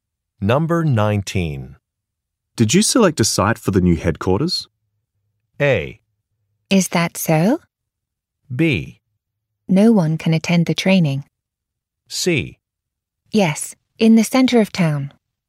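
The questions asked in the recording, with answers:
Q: Did you select a site for the new headquarters?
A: C: Yes, in the center of town.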